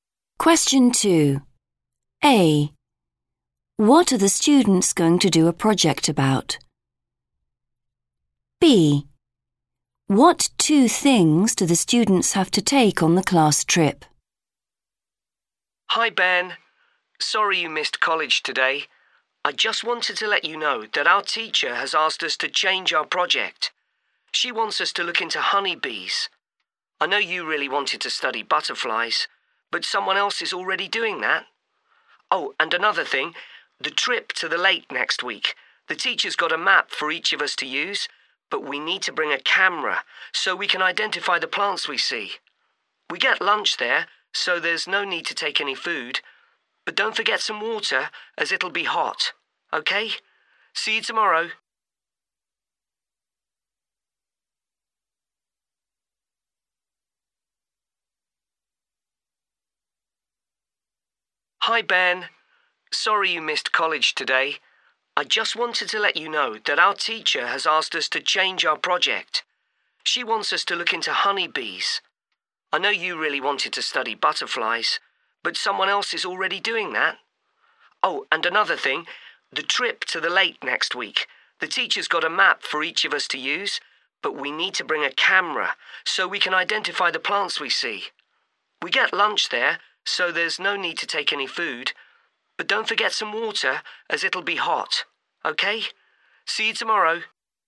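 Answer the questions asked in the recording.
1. honeybees
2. a camera and water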